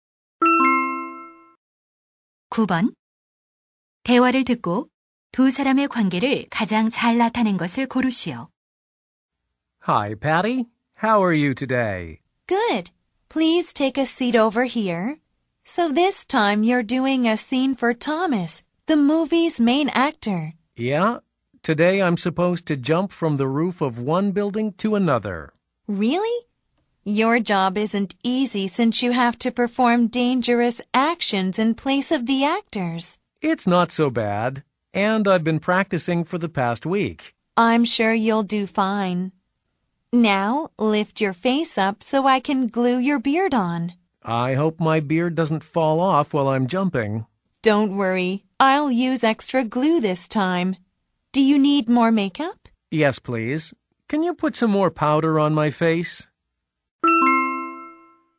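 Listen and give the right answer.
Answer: 스턴트맨 - 분장사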